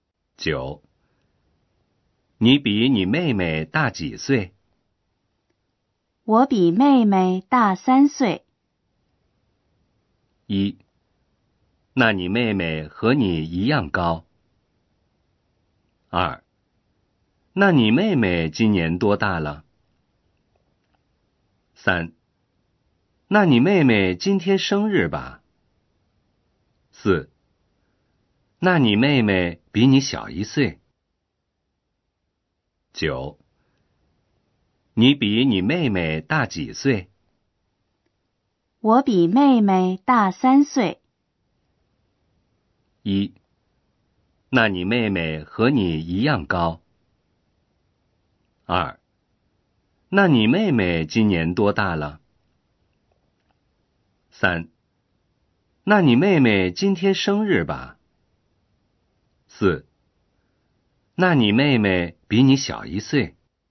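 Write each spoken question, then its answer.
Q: 你比你妹妹大几岁?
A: 2: 那你妹妹今年多大了?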